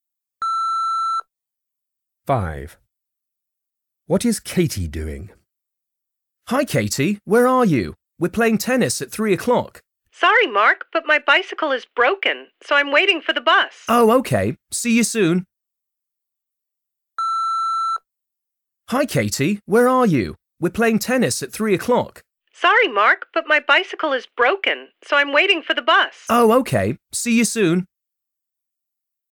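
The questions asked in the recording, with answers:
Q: What is Katie doing?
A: waiting for the bus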